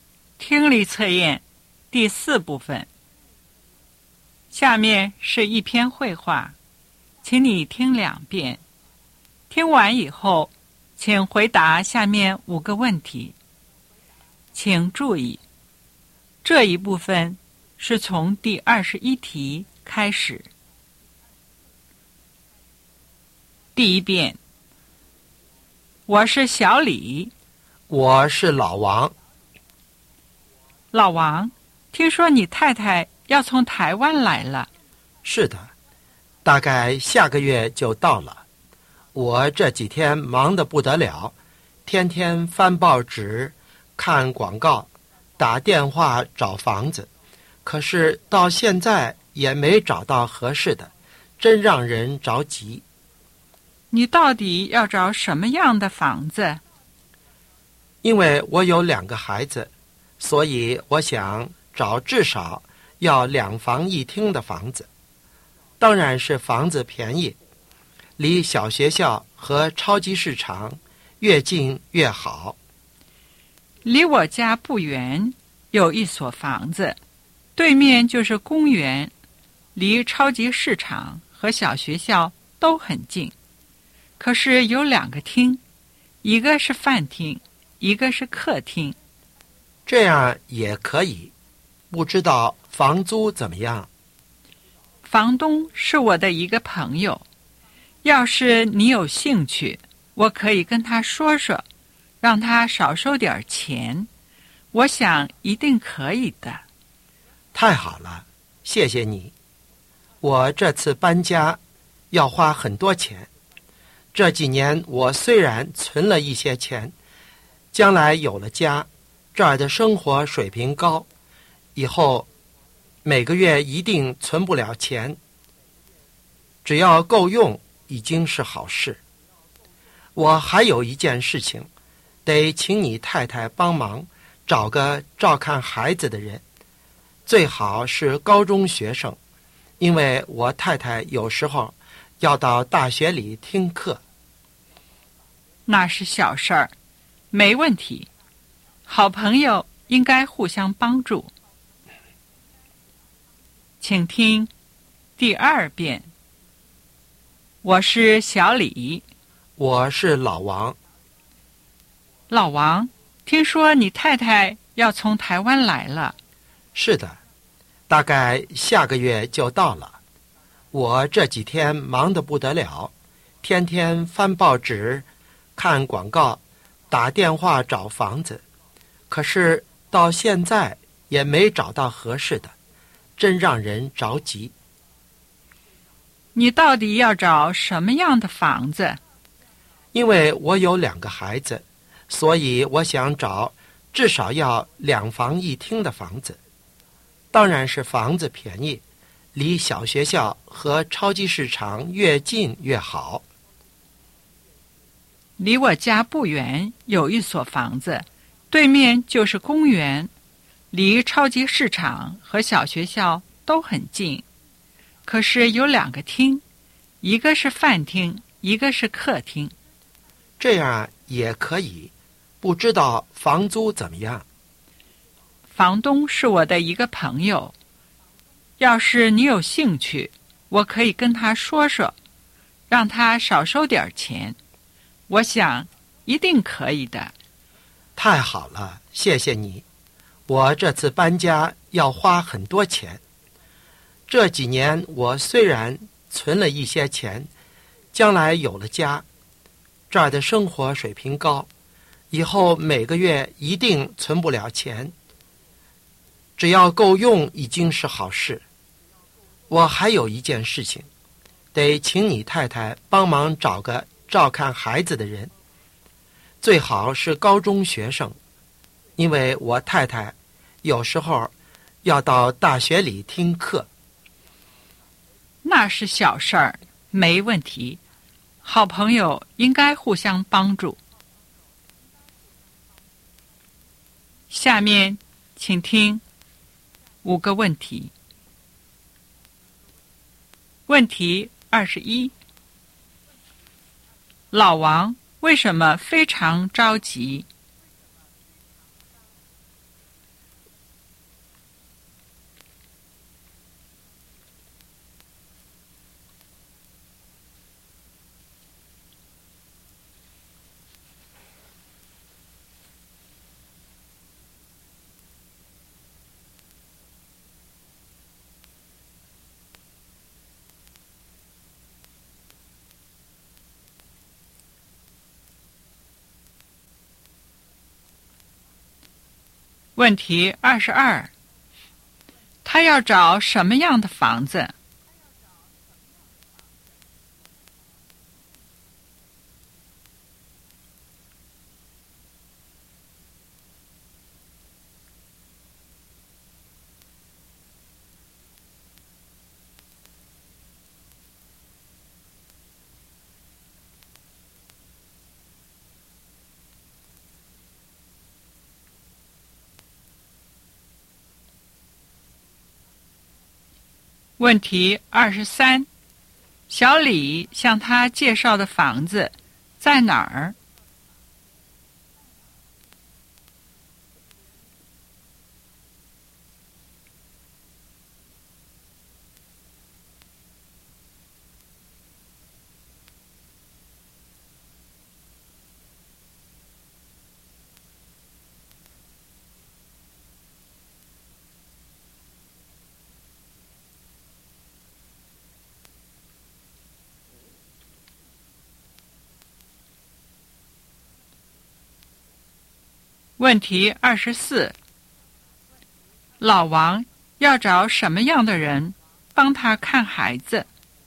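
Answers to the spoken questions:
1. 一直没找到合适的房子
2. 至少两房一厅、便宜、离小学和超市近的房子
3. 离小李家不远,对面是公园
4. 高中学生
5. 好朋友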